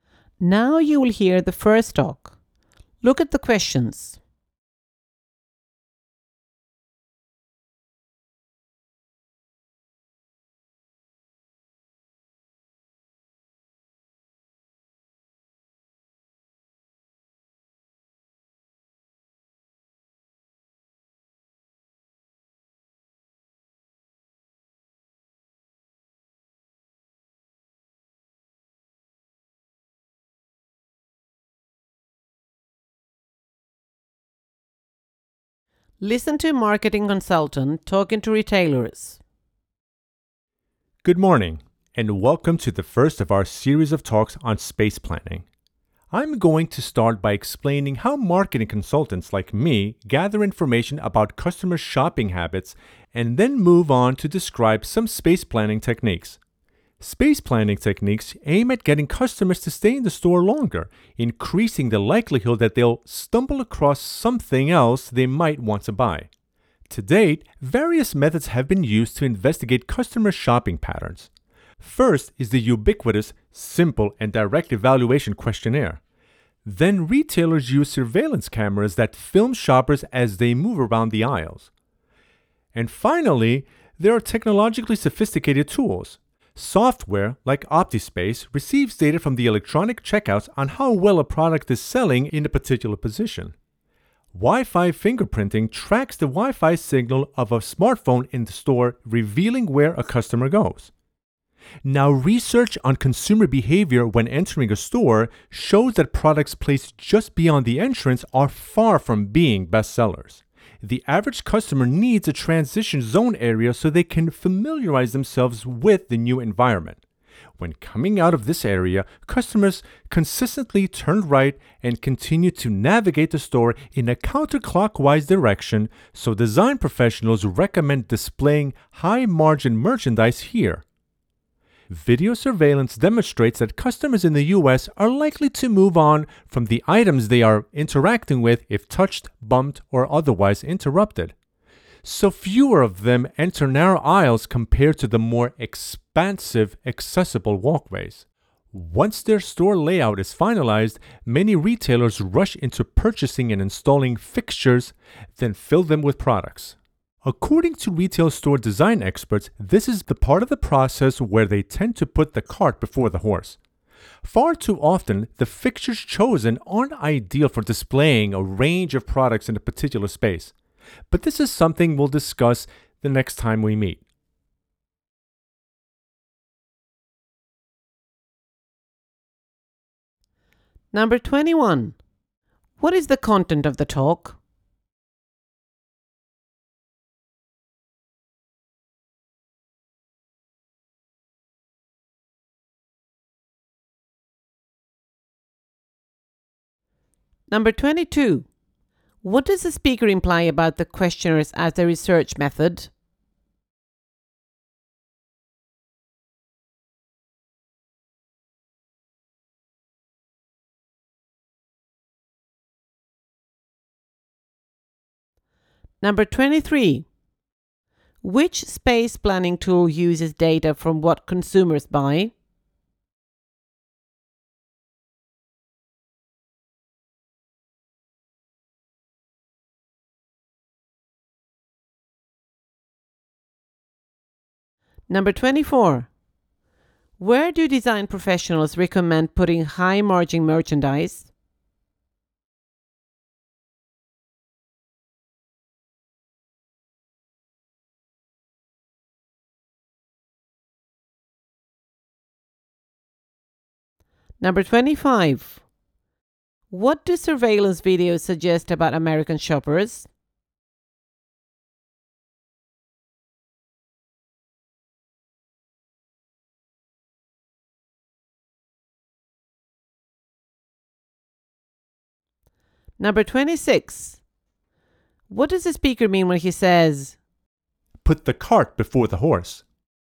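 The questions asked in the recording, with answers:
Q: What is the content of the talk?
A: How consultants gather information on shopping habits, and space planning techniques

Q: Which space planning tool uses data from what consumers buy?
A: OptiSpace software, using checkout data

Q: Where do design professionals recommend putting high-margin merchandise?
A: To the right, just past the transition zone inside the entrance

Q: What do surveillance videos suggest about American shoppers?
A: They move on if touched or bumped, so they avoid narrow aisles

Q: What does the speaker mean when he says,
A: Retailers do things in the wrong order, buying fixtures before thinking about how to display products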